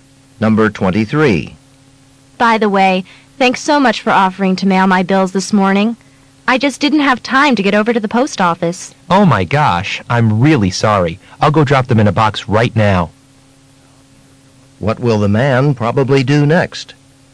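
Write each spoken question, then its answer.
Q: What will the man probably do next?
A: Mail the bills right away.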